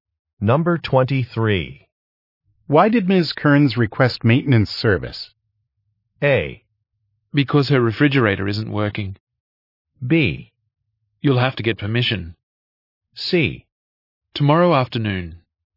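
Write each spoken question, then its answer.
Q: Why did Ms. Kearns request maintenance service?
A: A: Because her refrigerator isn't working.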